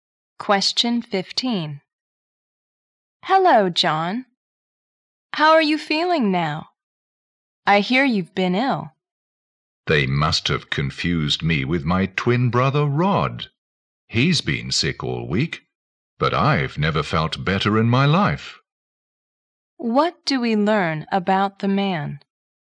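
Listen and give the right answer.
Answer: He is well; it was his twin brother Rod who was ill.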